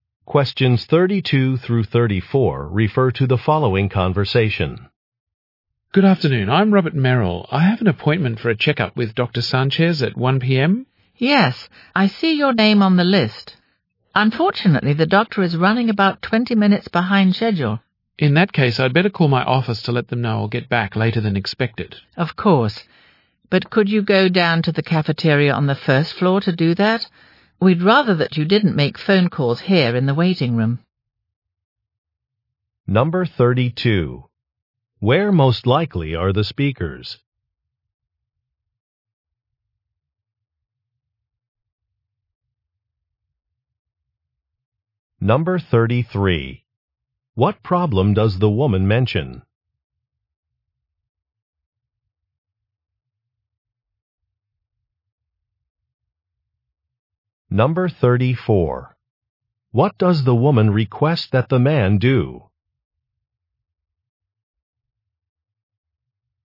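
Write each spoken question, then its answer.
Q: Where most likely are the speakers?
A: At a doctor's office

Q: What problem does the woman mention?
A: The doctor is running about 20 minutes late

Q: What does the woman request that the man do?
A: Make his phone call in the cafeteria on the first floor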